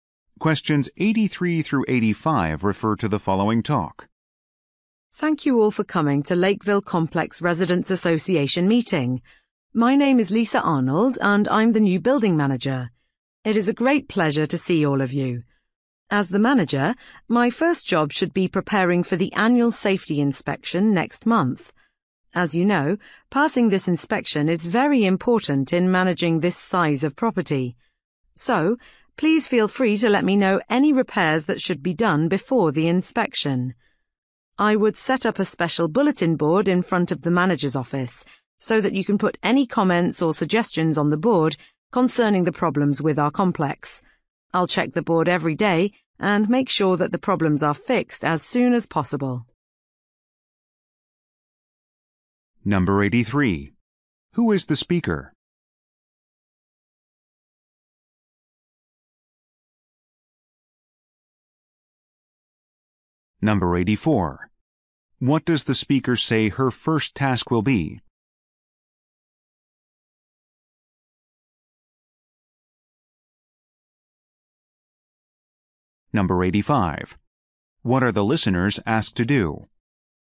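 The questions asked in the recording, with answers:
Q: Who is the speaker?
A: The new building manager

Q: What does the speaker say her first task will be?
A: Preparing for the annual safety inspection

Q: What are the listeners asked to do?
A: Report repairs needed before the inspection, using the bulletin board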